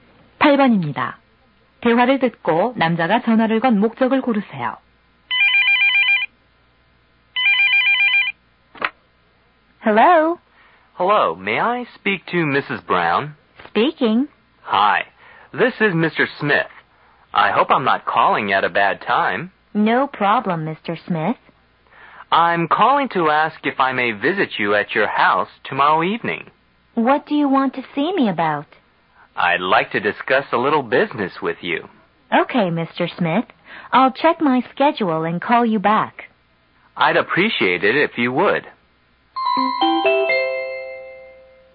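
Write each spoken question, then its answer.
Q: 대화를 듣고 남자가 전화를 건 목적을 고르세요.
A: 사업 이야기를 하러 방문 약속을 잡으려고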